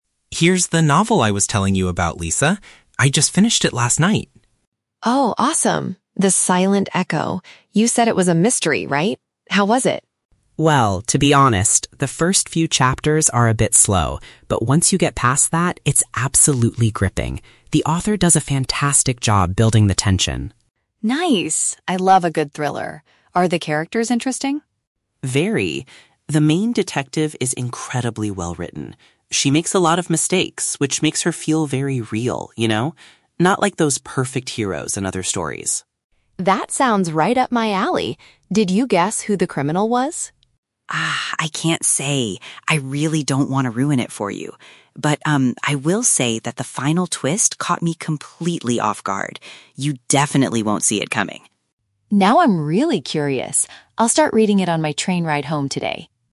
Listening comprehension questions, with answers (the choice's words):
Listen to two friends talking about a book. Choose the correct answer (A, B, or C).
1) What is the man's opinion about the beginning of the novel?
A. It lacks excitement.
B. It is very gripping.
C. It is confusing to read.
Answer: It lacks excitement.

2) Why does the man like the main detective in the story?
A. She is a flawless hero.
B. She acts like a normal human being.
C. She solves the mystery very quickly.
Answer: She acts like a normal human being.

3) Why does the man refuse to reveal the identity of the criminal?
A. He hasn't finished reading the book yet.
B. He didn't understand the final chapter.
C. He wants the woman to experience the surprise herself.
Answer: He wants the woman to experience the surprise herself.

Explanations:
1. Mark says that "the first few chapters are a bit slow." In this context, "slow" means it lacks action or excitement. The Trap: Option (B) is a trap. Mark uses the word "gripping" (exciting), but he uses it to describe the middle of the book, not the beginning. Option (C) is plausible for a mystery novel but is never mentioned.
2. Mark says the detective "makes a lot of mistakes" which makes her "feel very real." This is a paraphrase of acting like a normal, imperfect human being. The Trap: Option (A) is a trap. Mark mentions "perfect heroes," but he specifically says the detective is not like them. Option (C) is a common trait of detectives in stories, but it is not mentioned here.
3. Mark says he doesn't want to "ruin it" for her and mentions a "final twist" that will catch her off guard. This means he wants her to be surprised when she reads it. The Trap: Option (A) is a trap because reading a book is the main topic, but Mark explicitly states at the very beginning: "I just finished it last night." Option (B) is incorrect because he understood the twist perfectly well; it just surprised him.

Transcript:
Mark: Here's the novel I was telling you about, Lisa. I just finished it last night.
Lisa: Oh, awesome! The Silent Echo. You said it was a mystery, right? How was it?
Mark: Well, to be honest, the first few chapters are a bit slow. But once you get past that, it's absolutely gripping. The author does a fantastic job building the tension.
Lisa: Nice. I love a good thriller. Are the characters interesting?
Mark: Very. The main detective is incredibly well-written. She makes a lot of mistakes, which makes her feel very real, you know? Not like those perfect heroes in other stories.
Lisa: That sounds right up my alley. Did you guess who the criminal was?
I can't say! I really don't want to ruin it for you. But, um, I will say that the final twist caught me completely off guard. You definitely won't see it coming.